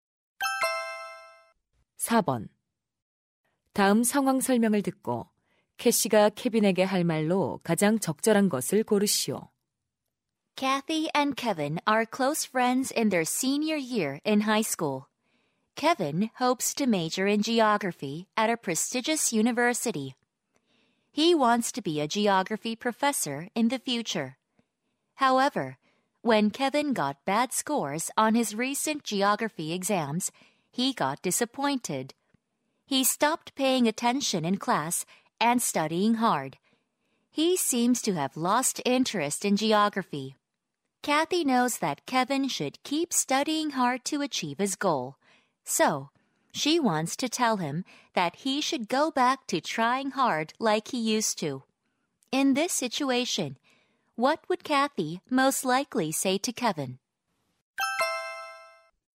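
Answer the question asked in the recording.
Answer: You should go back to studying hard like you used to.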